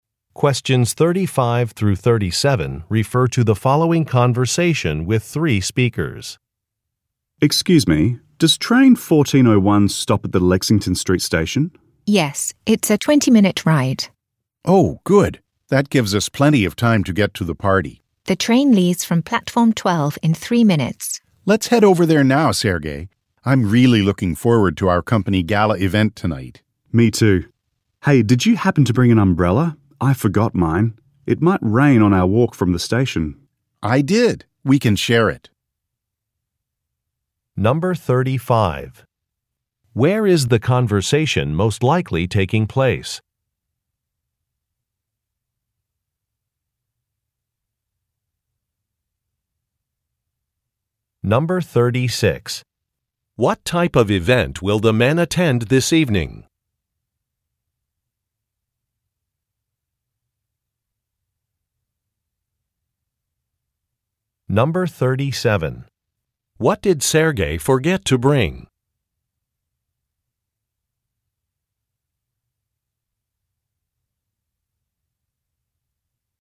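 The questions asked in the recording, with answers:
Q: Where is the conversation most likely taking place?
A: At a train station

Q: What type of event will the men attend this evening?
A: A company gala

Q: What did Sergei forget to bring?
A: An umbrella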